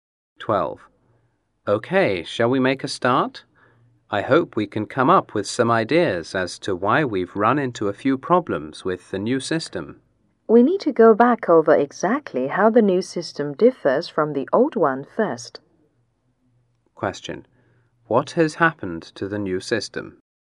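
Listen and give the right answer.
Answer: It has run into some problems.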